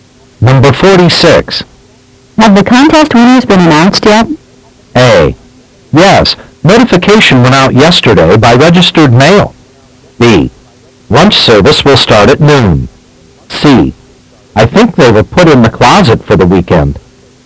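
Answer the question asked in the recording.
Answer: A: Yes, notification went out yesterday by registered mail.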